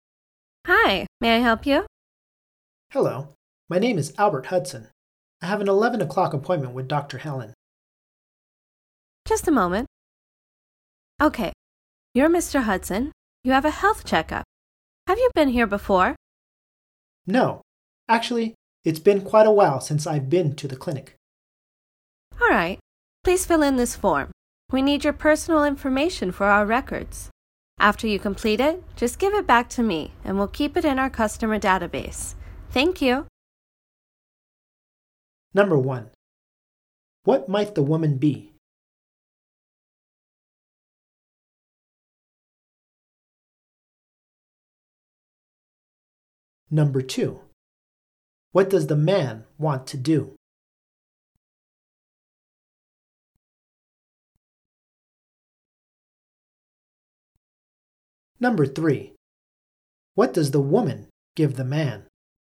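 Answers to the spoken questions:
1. A receptionist at a clinic
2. Have a health checkup
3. A form to fill in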